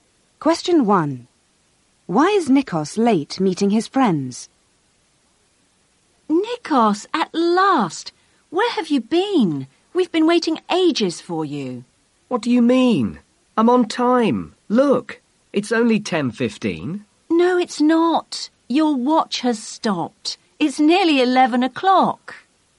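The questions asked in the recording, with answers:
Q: Why is Nikos late meeting his friends?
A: His watch has stopped.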